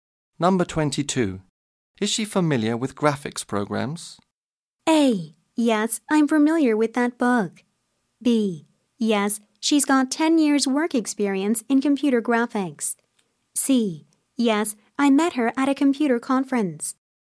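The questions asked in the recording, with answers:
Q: Is she familiar with graphics programs?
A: B: Yes, she's got 10 years work experience in computer graphics.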